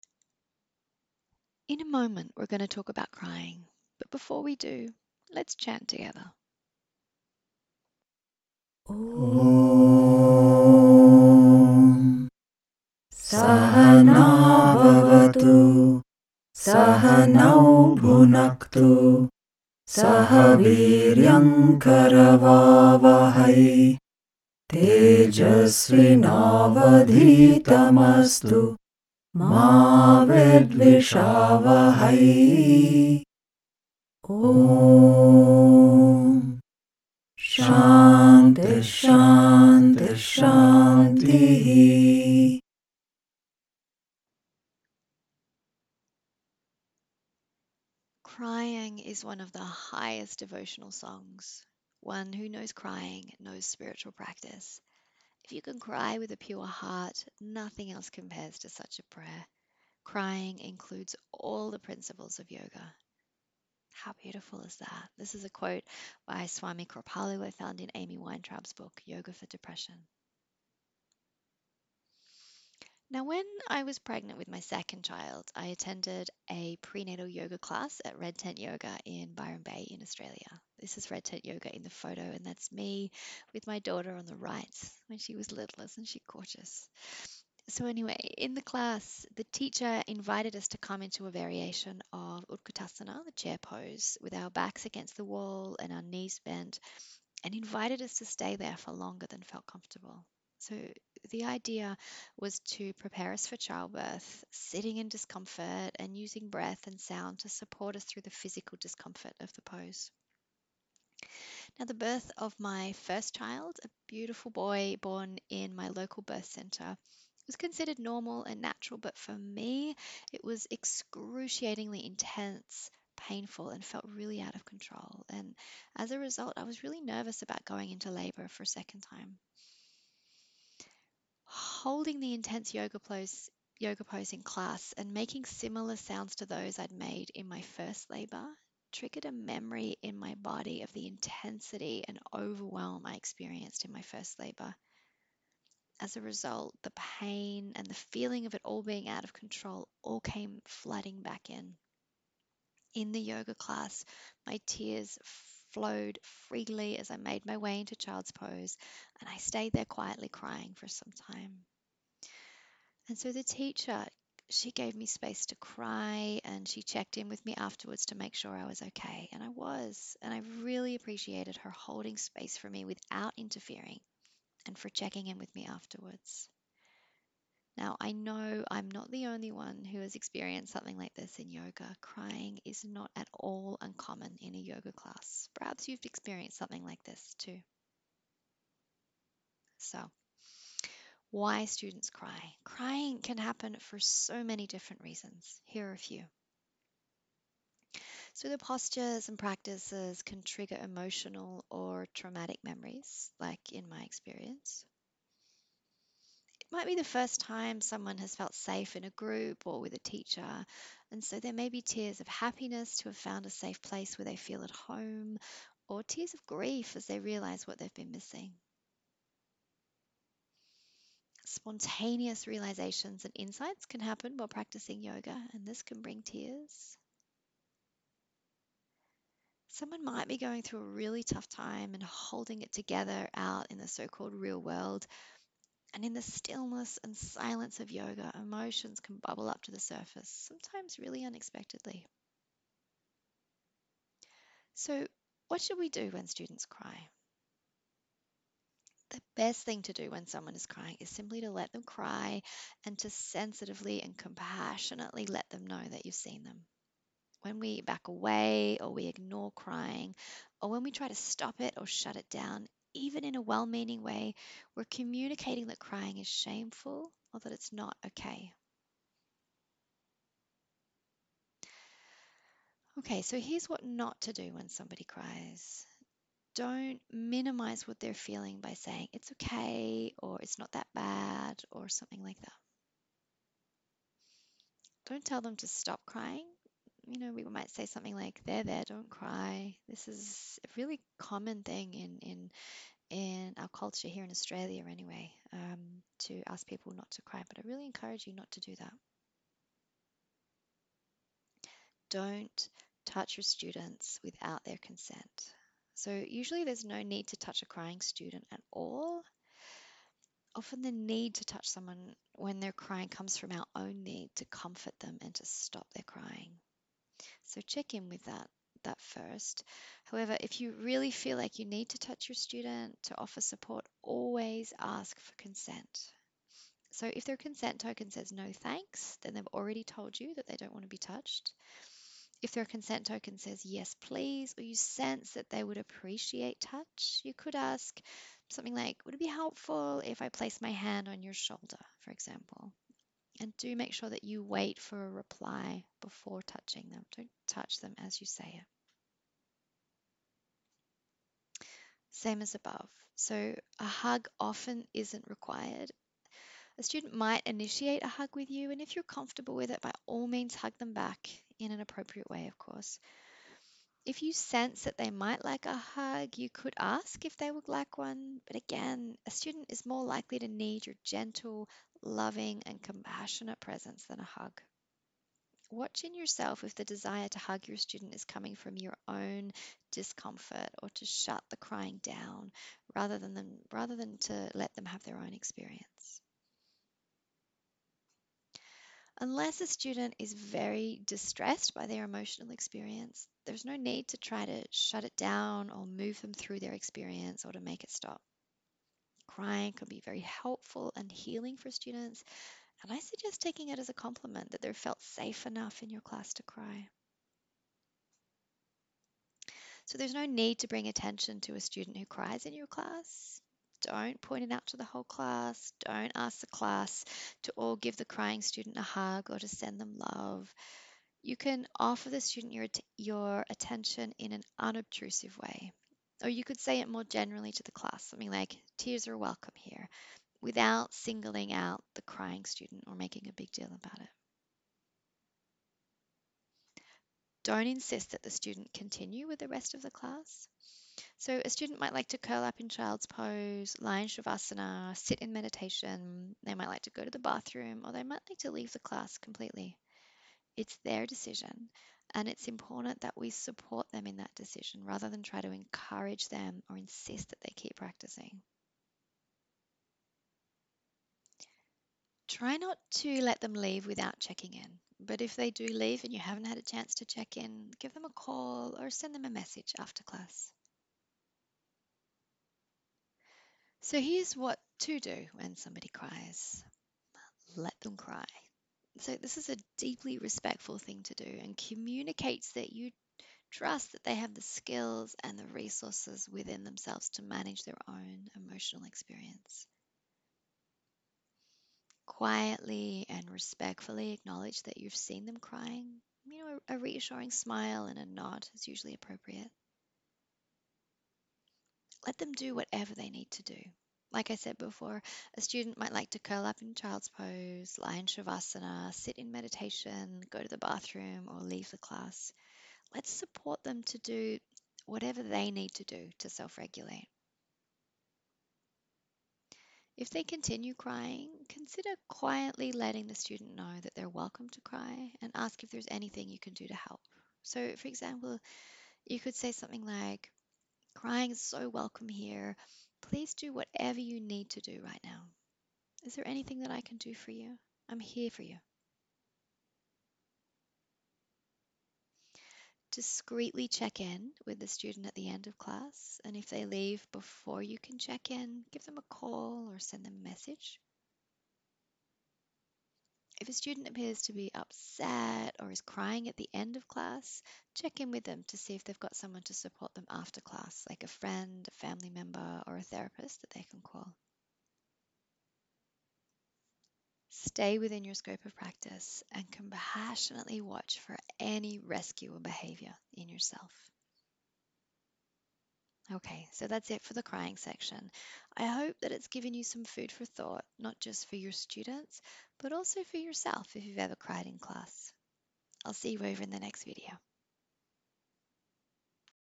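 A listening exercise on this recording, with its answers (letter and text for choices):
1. Why might students cry in class?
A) Postures and practices can trigger emotional or traumatic memories.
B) Spontaneous realisations and insights can happen while practicing yoga and this can bring tears.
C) All of the above.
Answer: C) All of the above.

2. How could you support a crying student in your class?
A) Let them cry and sensitively and compassionately let them know that you see them.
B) Give them a hug straight away.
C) Let the whole class know that they're crying and ask everyone to send them some love.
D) All of the above.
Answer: A) Let them cry and sensitively and compassionately let them know that you see them.

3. If a student cries in class, it's important for you to:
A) Discretely check in with the student.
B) Stay within your scope of practice.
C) Compassionately watch for any rescuer behaviour in yourself.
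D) All of the above.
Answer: D) All of the above.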